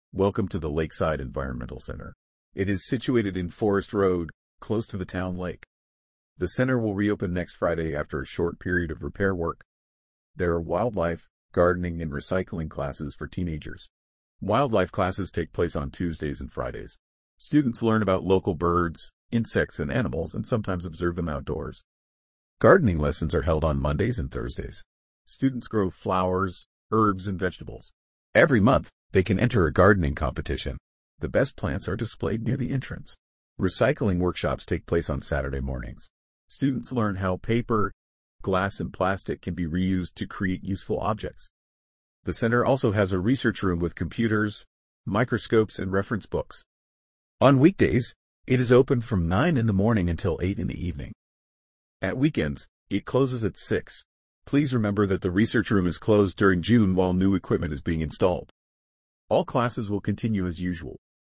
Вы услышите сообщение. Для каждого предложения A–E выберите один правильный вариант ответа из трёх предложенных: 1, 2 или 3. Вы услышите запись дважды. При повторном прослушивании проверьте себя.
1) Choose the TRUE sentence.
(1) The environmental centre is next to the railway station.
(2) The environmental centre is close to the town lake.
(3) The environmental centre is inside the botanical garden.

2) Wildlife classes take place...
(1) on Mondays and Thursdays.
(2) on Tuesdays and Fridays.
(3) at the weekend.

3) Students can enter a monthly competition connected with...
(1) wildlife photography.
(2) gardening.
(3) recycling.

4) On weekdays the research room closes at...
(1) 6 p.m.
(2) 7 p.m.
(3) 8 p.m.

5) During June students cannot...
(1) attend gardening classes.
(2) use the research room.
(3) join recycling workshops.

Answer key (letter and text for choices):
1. (2) The environmental centre is close to the town lake.
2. (2) on Tuesdays and Fridays.
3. (2) gardening.
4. (3) 8 p.m.
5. (2) use the research room.

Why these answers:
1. Экологический центр расположен на Форест-роуд рядом с городским озером.
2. Занятия, посвящённые дикой природе, проходят по вторникам и пятницам.
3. Каждый месяц учащиеся могут участвовать в конкурсе по садоводству.
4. В будние дни исследовательская комната работает до восьми часов вечера.
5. В июне учащиеся не могут пользоваться исследовательской комнатой, так как там устанавливают новое оборудование.

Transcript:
Welcome to the Lakeside Environmental Centre. It is situated in Forest Road, close to the town lake. The centre will reopen next Friday after a short period of repair work.
There are wildlife, gardening and recycling classes for teenagers. Wildlife classes take place on Tuesdays and Fridays. Students learn about local birds, insects and animals and sometimes observe them outdoors.
Gardening lessons are held on Mondays and Thursdays. Students grow flowers, herbs and vegetables. Every month, they can enter a gardening competition. The best plants are displayed near the entrance.
Recycling workshops take place on Saturday mornings. Students learn how paper, glass and plastic can be reused to create useful objects.
The centre also has a research room with computers, microscopes and reference books. On weekdays, it is open from nine in the morning until eight in the evening. At weekends, it closes at six.
Please remember that the research room is closed during June while new equipment is being installed. All classes will continue as usual.

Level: 8 класса